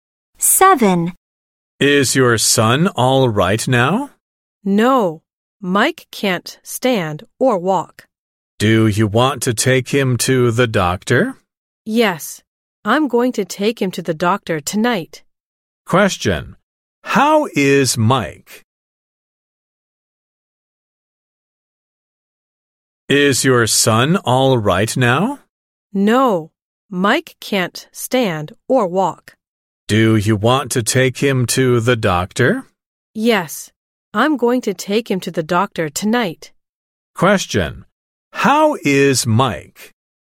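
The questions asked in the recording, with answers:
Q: How is Mike?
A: He is sick; he can't stand or walk.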